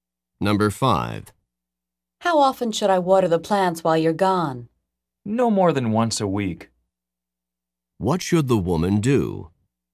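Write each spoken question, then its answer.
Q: What should the woman do?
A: Water the plants once a week at most.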